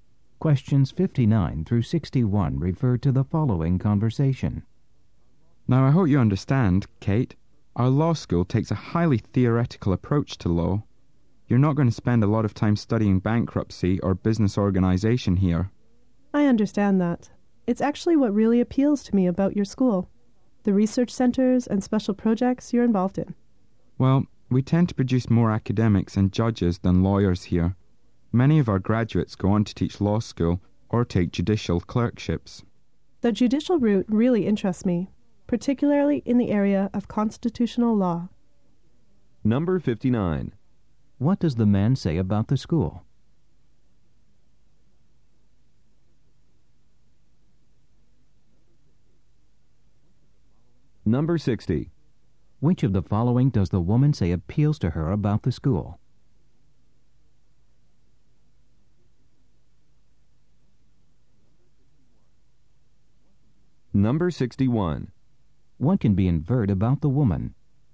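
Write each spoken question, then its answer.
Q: What does the man say about the school?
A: It takes a highly theoretical approach to law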